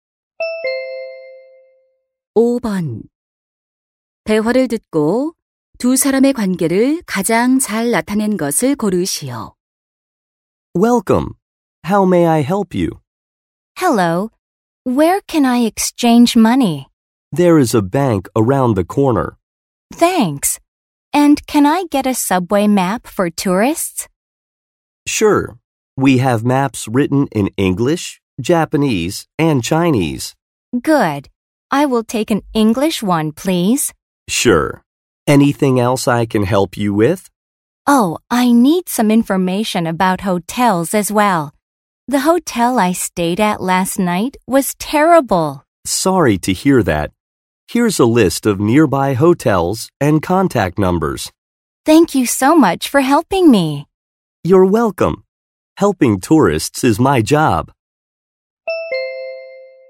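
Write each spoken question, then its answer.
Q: 대화를 듣고 두 사람의 관계를 가장 잘 나타낸 것을 고르시오.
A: 관광 안내소 직원 - 관광객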